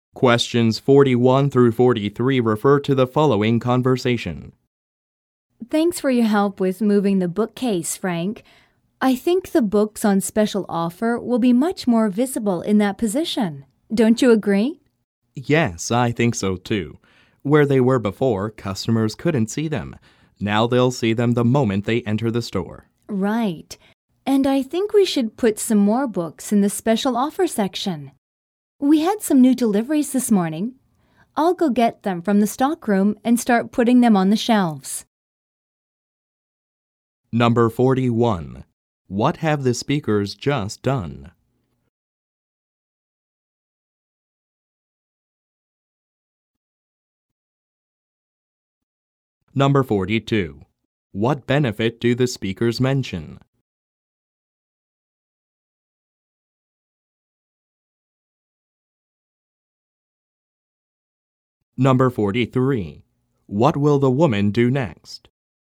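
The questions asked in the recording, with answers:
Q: What have the speakers just done?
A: Moved a bookcase

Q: What benefit do the speakers mention?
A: Customers will see the special offer books as soon as they enter the store

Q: What will the woman do next?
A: Get the new books from the stockroom and put them on the shelves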